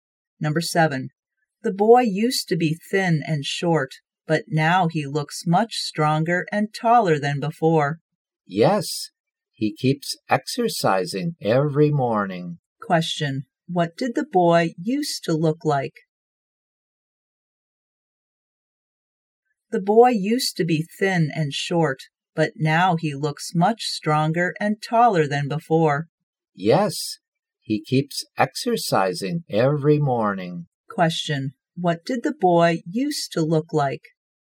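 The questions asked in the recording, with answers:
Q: what did the boy used to look like?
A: Thin and short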